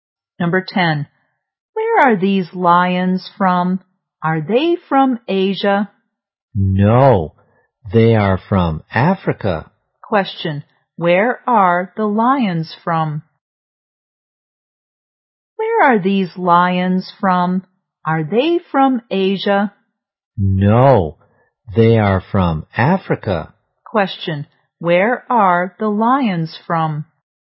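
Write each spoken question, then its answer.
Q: Where are the lions from?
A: Africa.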